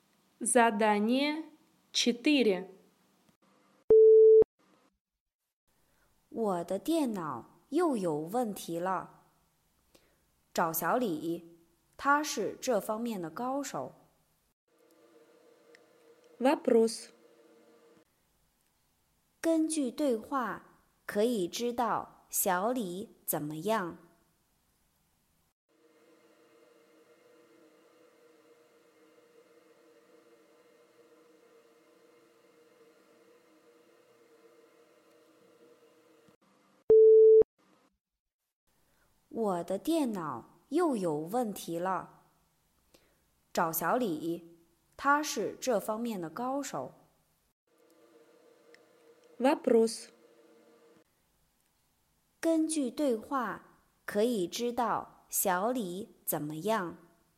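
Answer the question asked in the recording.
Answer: 他是电脑方面的高手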